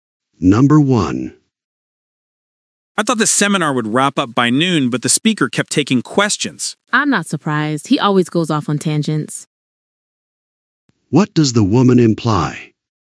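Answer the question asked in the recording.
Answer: The speaker often digresses, so the overrun was expected.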